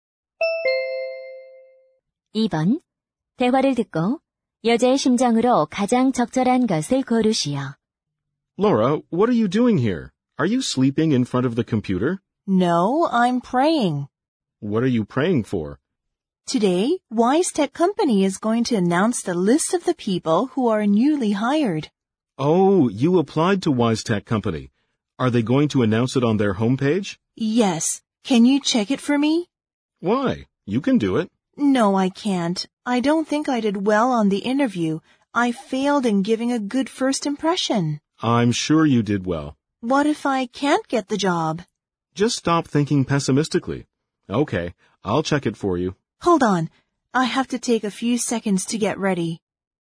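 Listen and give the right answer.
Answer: 초조하고 불안함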